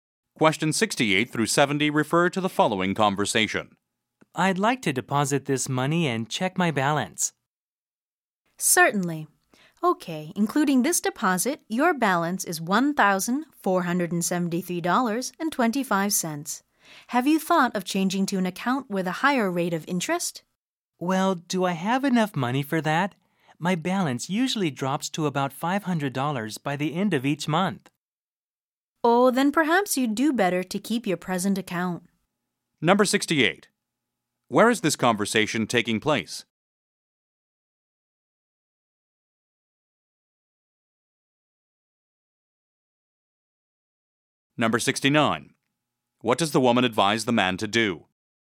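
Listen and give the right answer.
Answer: At a bank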